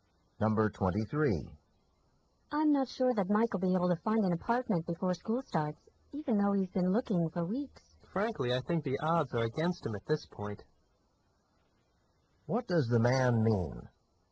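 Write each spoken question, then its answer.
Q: What does the man mean?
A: Mike probably won't find an apartment in time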